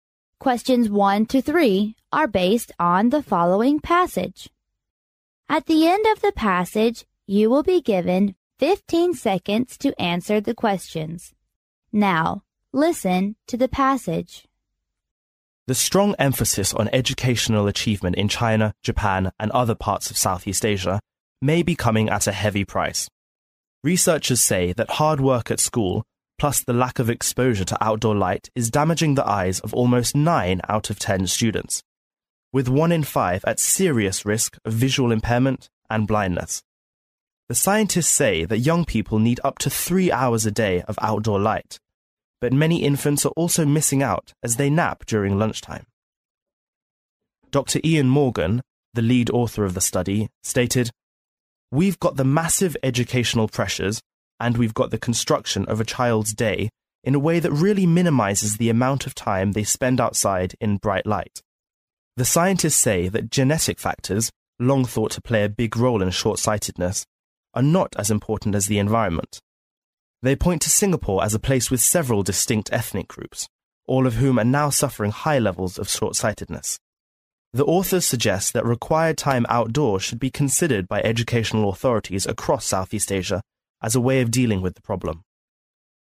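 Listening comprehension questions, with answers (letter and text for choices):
Now,listen to the passage.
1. In Asia,the percent of the students whose eyes are being damaged is ______.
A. 19%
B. 90%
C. 20%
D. l0%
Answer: B. 90%

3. The connection of Singapore with high levels of short-sightedness is to prove that______.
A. genetic factors play more important role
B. environment factors play a big role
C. both genetic factors and environment do harm to people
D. both genetic factors and environment has something to do with short-sightedness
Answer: B. environment factors play a big role

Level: 英语四级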